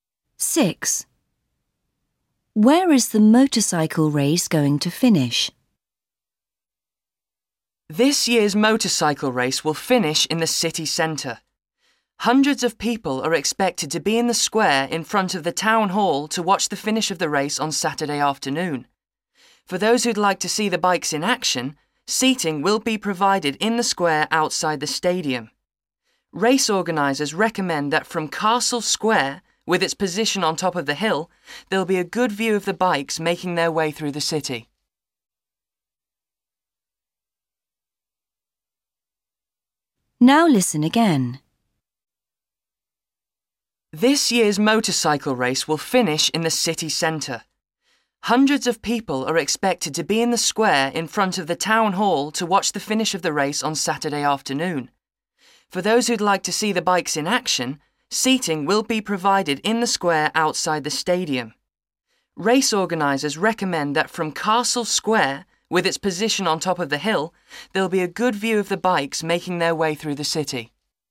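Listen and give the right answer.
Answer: In the square in front of the town hall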